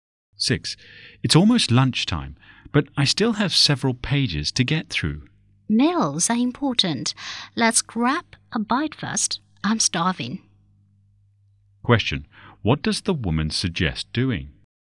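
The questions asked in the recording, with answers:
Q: What does the woman suggest doing?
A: Having lunch first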